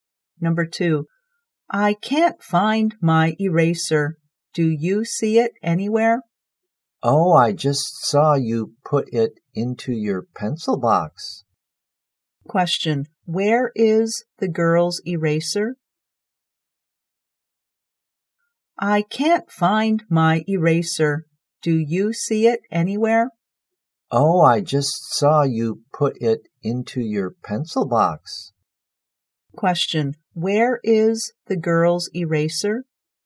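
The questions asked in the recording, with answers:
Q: Question, where is the girl's eraser?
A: In her pencil box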